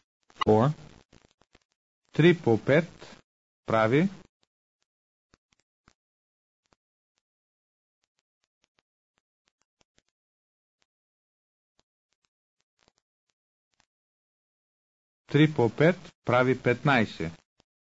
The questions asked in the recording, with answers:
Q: 3 по 5 прави.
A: 3 по 5 прави 15.